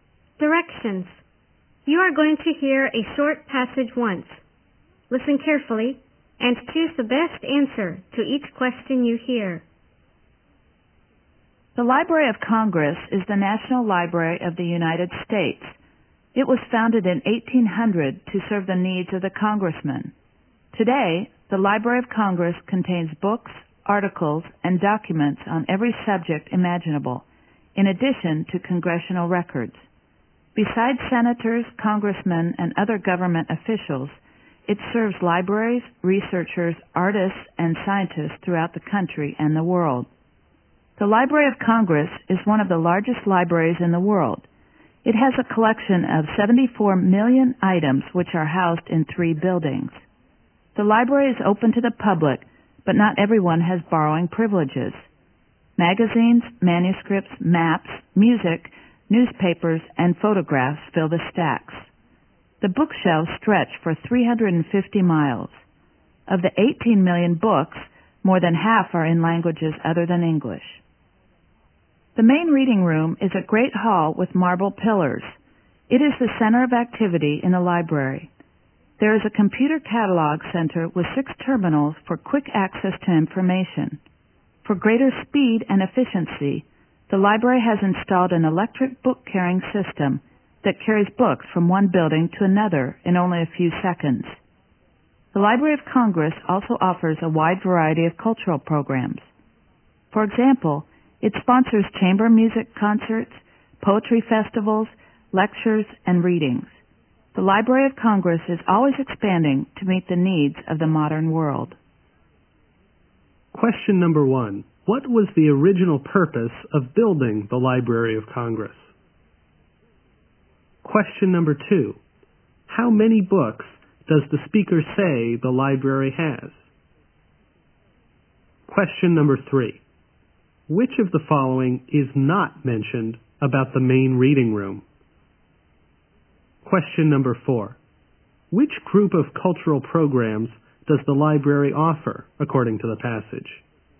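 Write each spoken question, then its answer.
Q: What was the original purpose of building the Library of Congress?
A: To serve the needs of the congressmen

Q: How many books does the speaker say the library has?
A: 18 million

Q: Which group of cultural programs does the library offer, according to the passage?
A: Chamber music concerts, poetry festivals, lectures and readings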